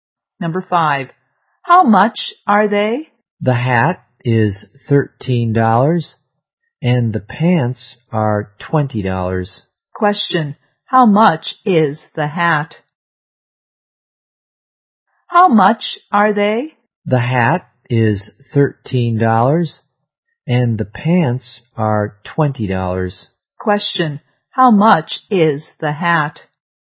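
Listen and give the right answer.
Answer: $13.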